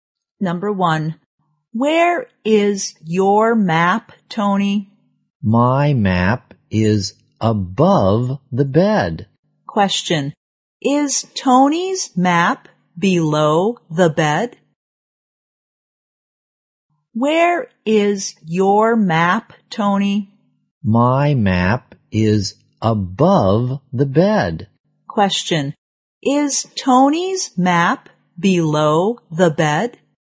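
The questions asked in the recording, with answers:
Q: is Tony's map below the bed?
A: No, it's above the bed.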